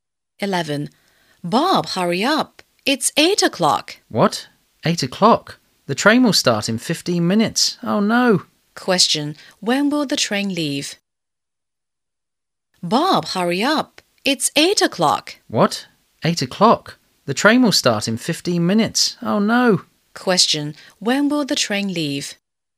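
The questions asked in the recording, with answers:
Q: Question, when will the train leave?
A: At 8:15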